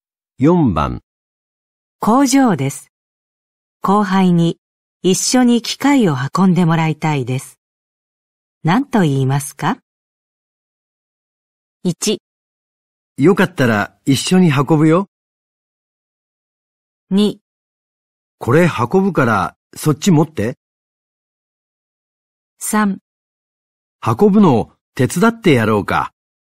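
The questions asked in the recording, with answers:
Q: 工場です。後輩に一緒に機械を運んでもらいたいです。何と言いますか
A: 2: これ運ぶからそっち持って。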